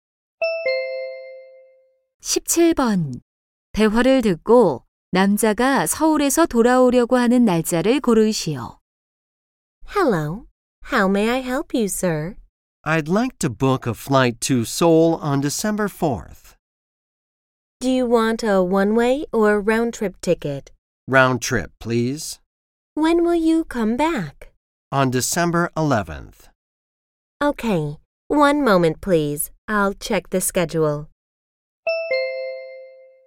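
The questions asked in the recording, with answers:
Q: 대화를 듣고 남자가 서울에서 돌아오려고 하는 날짜를 고르시오.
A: 12월 11일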